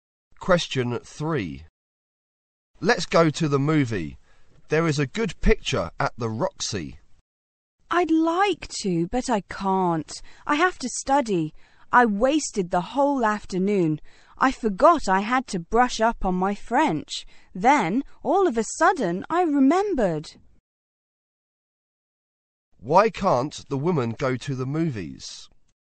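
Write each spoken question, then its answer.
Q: Why can't the woman go to the movies?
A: She has to study (brush up on her French).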